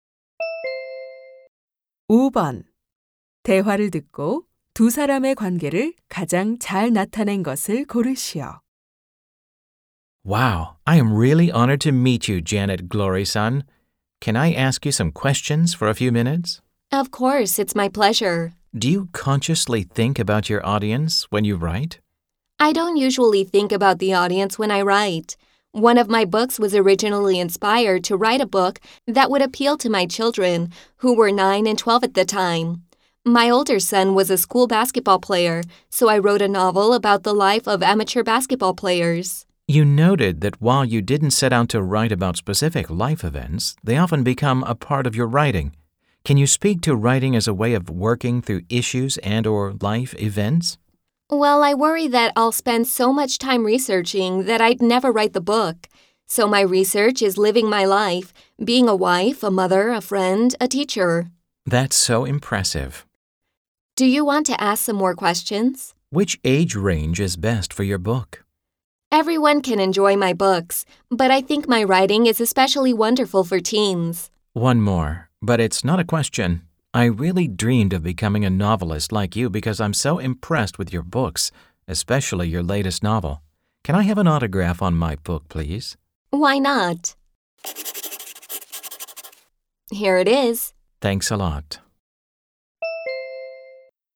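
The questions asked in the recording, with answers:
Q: 대화를 듣고 두 사람의 관계를 가장 잘 나타낸 것을 고르시오.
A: 인터뷰 진행자 – 소설가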